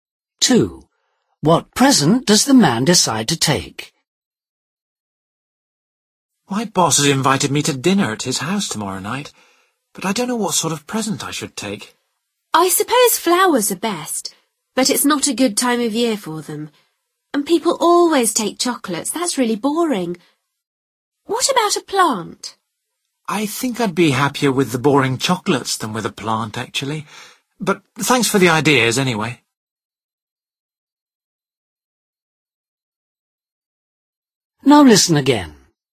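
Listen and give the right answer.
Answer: Chocolates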